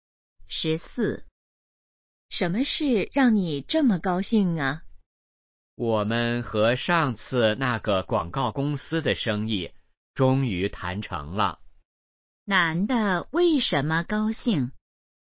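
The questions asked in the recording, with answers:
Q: 男的为什么高兴?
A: 和广告公司的生意谈成了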